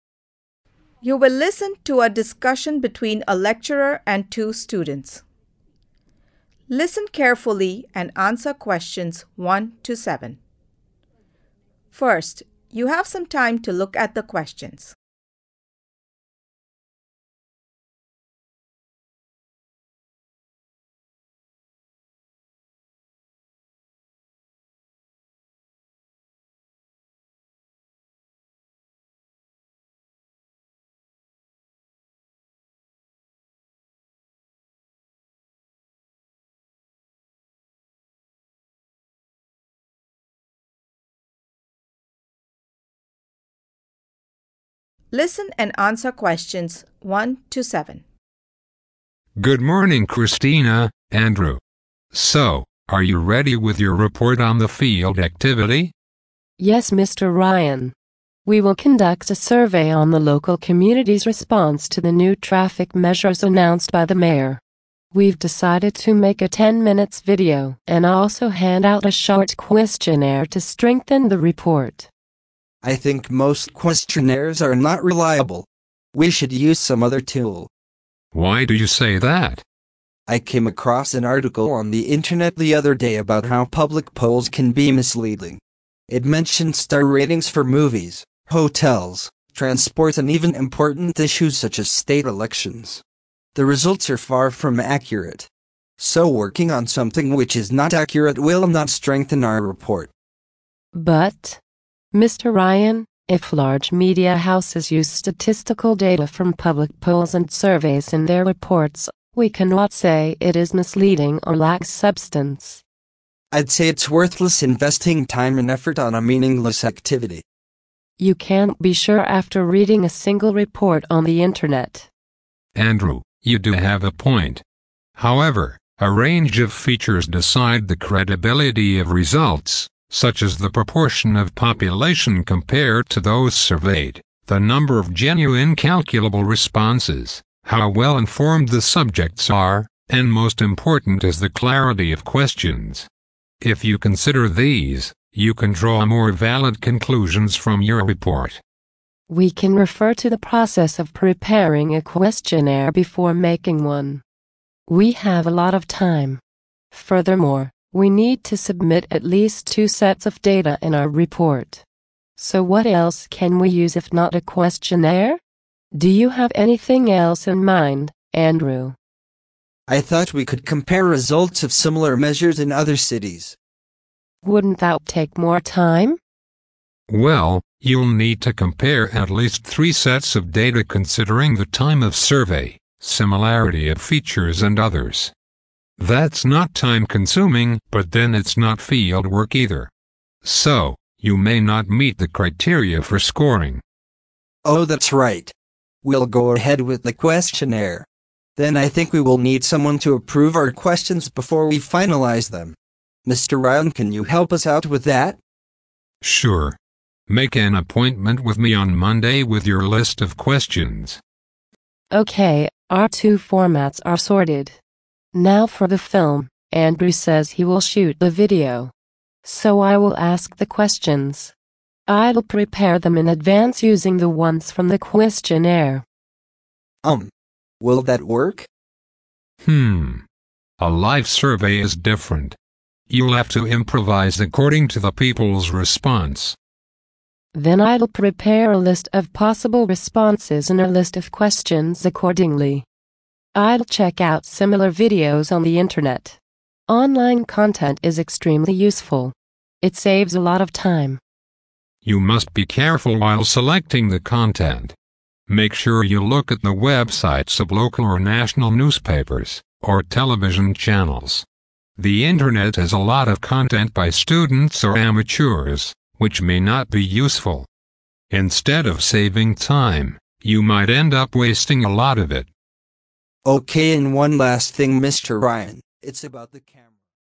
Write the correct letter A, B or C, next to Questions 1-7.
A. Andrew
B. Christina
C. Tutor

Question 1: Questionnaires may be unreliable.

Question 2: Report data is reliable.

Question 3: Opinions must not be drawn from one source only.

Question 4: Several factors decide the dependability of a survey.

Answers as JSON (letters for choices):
{"1": "A", "2": "B", "3": "B", "4": "C"}

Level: Beginner's Lessons